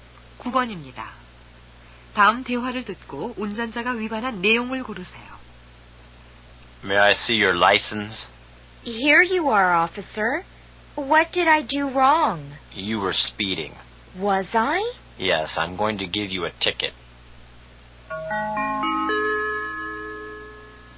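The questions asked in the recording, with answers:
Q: 다음 대화를 듣고 운전자가 위반한 내용을 고르세요.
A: 과속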